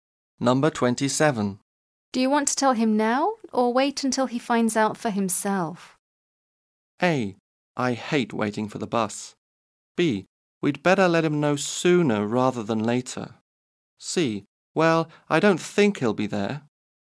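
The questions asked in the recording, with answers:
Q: Do you want to tell him now or wait until he finds out for himself?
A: B: We'd better let him know sooner rather than later.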